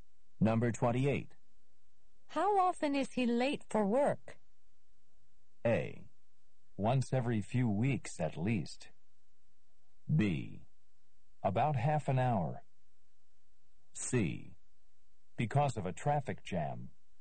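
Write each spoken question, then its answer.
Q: How often is he late for work?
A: A: Once every few weeks at least.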